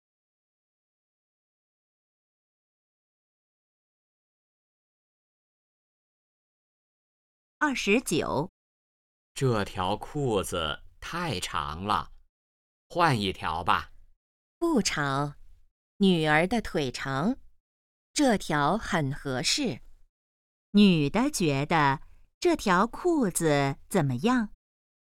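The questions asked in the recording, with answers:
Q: 女的觉得这条裤子怎么样?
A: 很合适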